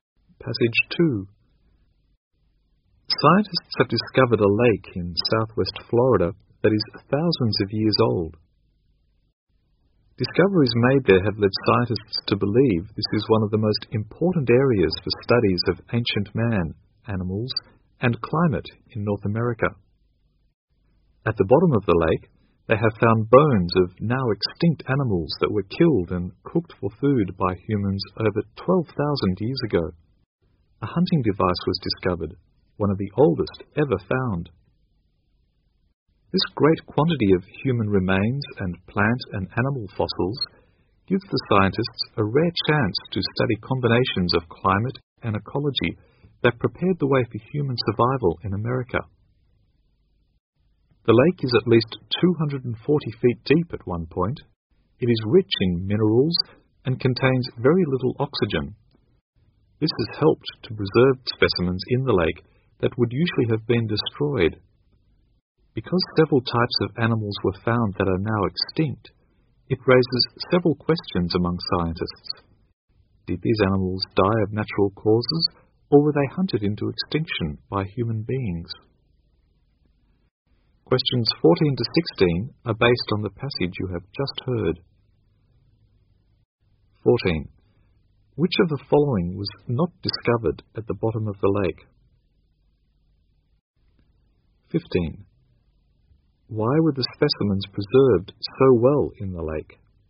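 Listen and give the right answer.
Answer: The lake is rich in minerals and has very little oxygen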